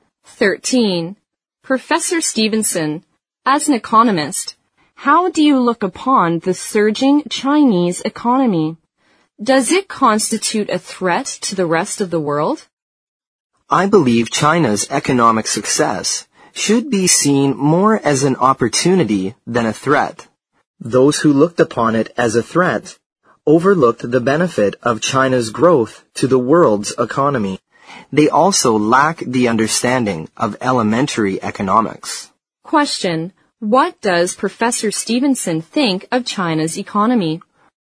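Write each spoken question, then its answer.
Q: what does Professor Stevenson think of China's economy?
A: Its success is more an opportunity than a threat to the world.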